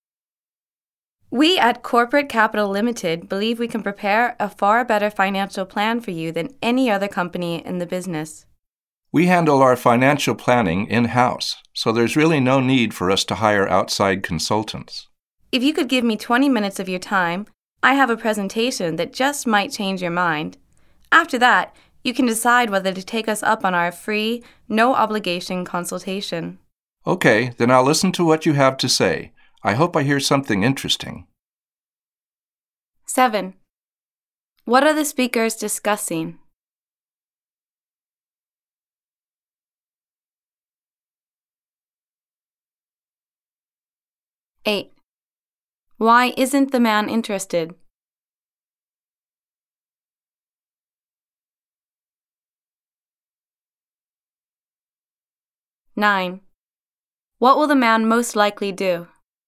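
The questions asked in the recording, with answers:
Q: What are the speakers discussing?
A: Financial planning services offered by Corporate Capital Limited

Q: Why isn't the man interested?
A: His company handles its financial planning in-house

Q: What will the man most likely do?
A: Listen to a 20-minute presentation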